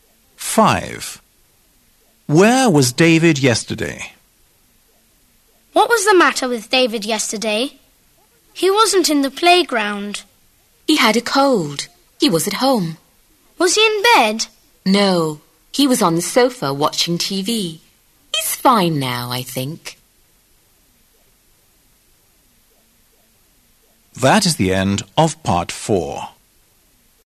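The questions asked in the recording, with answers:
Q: Where was David yesterday?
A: at home, on the sofa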